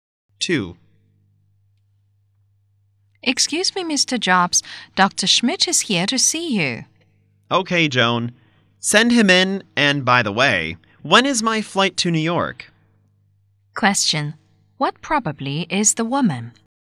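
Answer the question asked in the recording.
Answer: A secretary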